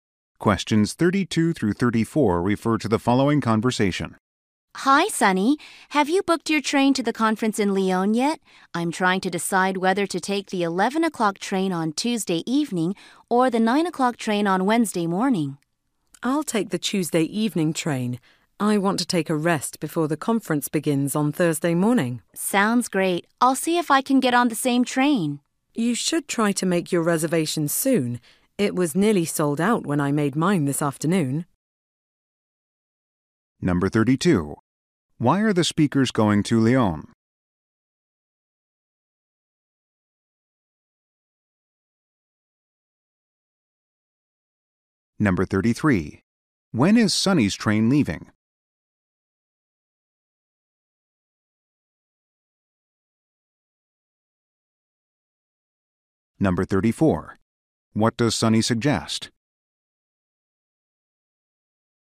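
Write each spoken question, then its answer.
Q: Why are the speakers going to Lyon?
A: To attend a conference

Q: What does Sunny suggest?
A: Making a reservation soon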